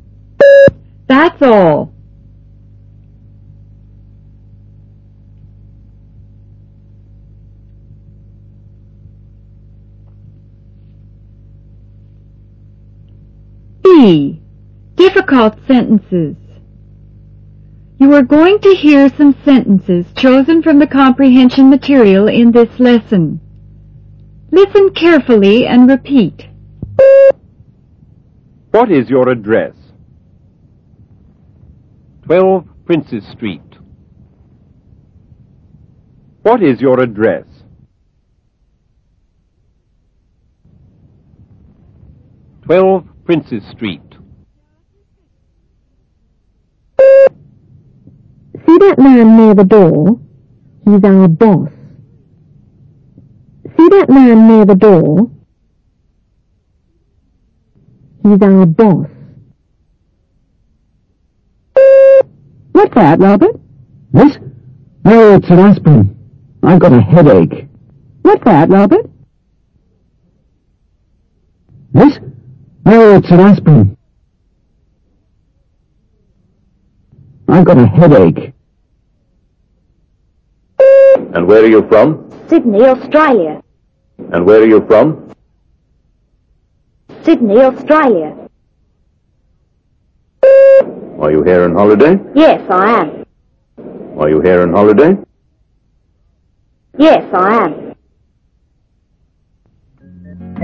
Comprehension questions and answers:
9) --__9__Princess Street.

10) See that man near the door? He's our __10__.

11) --This? Oh, it's an aspirin. I've got a __11__.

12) --__12__, Australia.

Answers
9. 12
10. boss
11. headache
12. Sydney